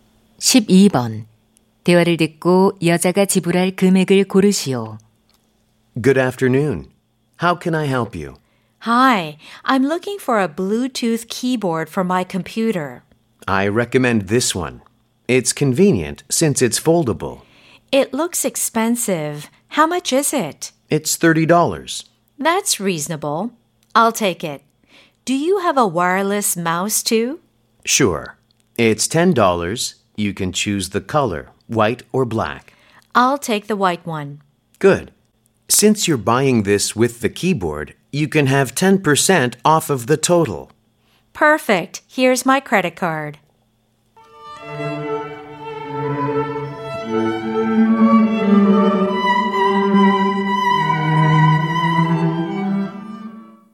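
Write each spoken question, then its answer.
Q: 대화를 듣고 여자가 지불할 금액을 고르시오.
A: $36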